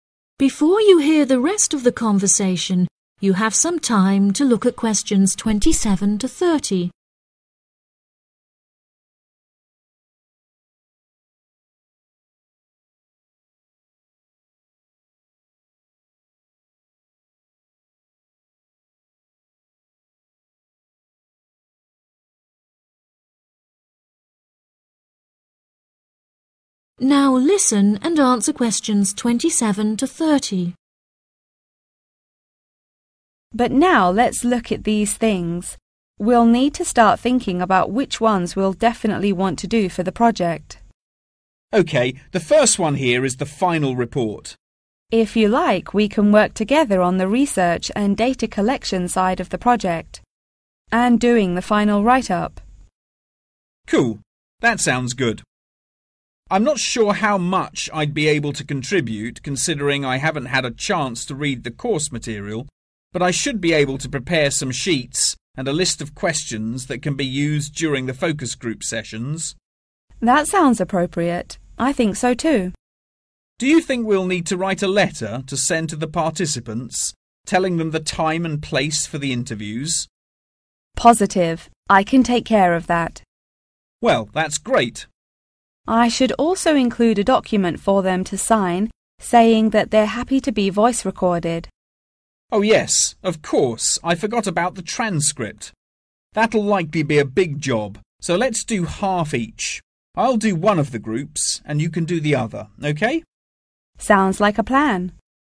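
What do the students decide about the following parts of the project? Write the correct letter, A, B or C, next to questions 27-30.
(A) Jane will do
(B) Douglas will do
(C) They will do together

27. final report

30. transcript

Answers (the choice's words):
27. They will do together
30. They will do together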